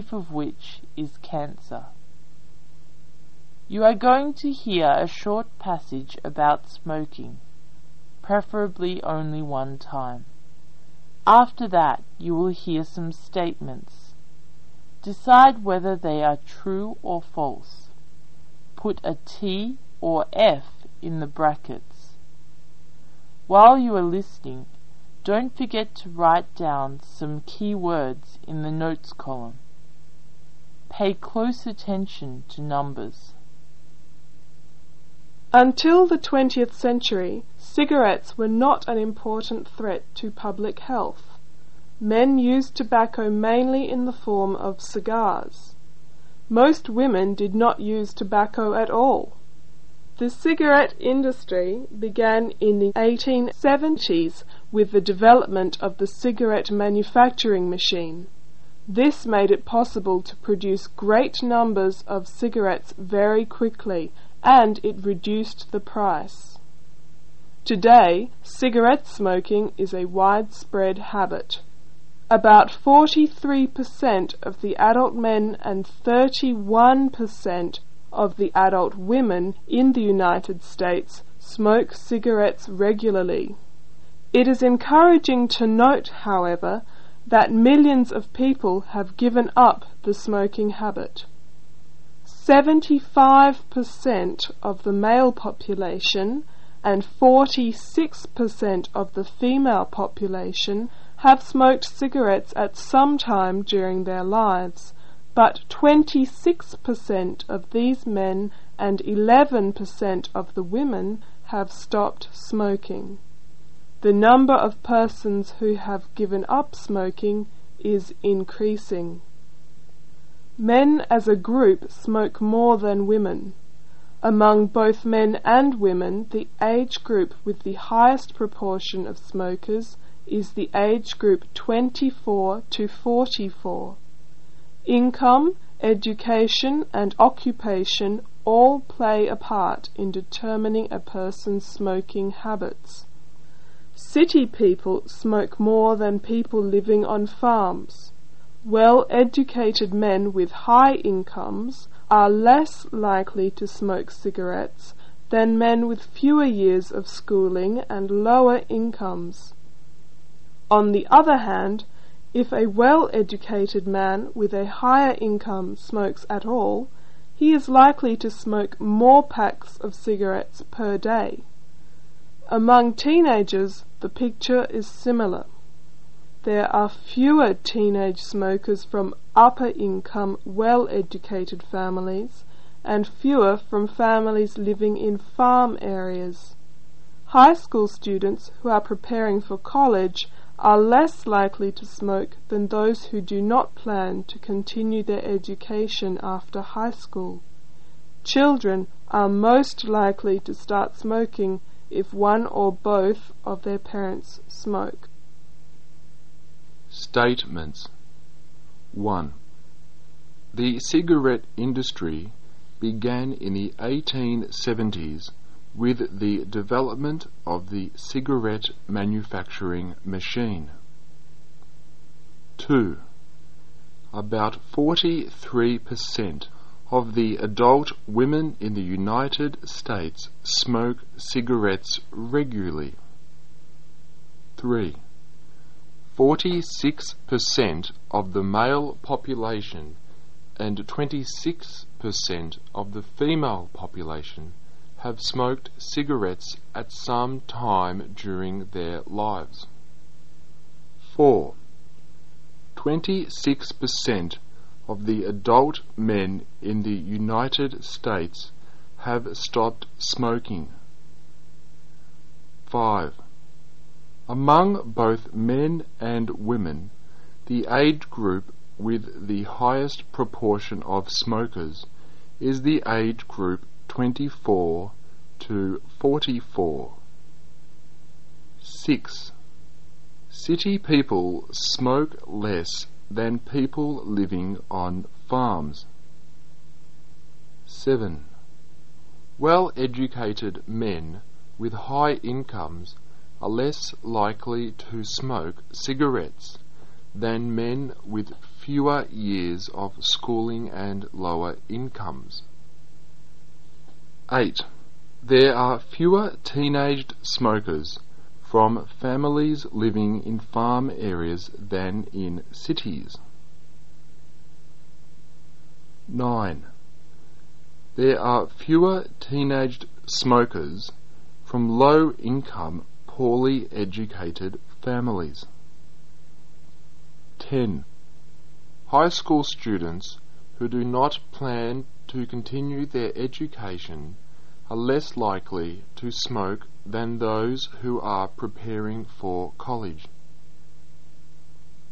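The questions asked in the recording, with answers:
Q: The cigarette industry began in the 1870s with the development of the cigarette manufacturing machine.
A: True

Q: About 43% of the adult women in the United States smoke cigarettes regularly.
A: False

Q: 46% of the male population and 26% of the female population have smoked cigarettes at some time during their lives.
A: False

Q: Among both men and women, the age group with the highest proportion of smokers is the age group 24 to 44.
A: True

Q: City people smoke less than people living on farms.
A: False

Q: Well-educated men with high incomes are less likely to smoke cigarettes than men with fewer years of schooling and lower incomes.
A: True

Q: There are fewer teenaged smokers from families living in farm areas than in cities.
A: True

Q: There are fewer teenaged smokers from low-income, poorly educated families.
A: False

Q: High school students who do not plan to continue their education are less likely to smoke than those who are preparing for college.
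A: False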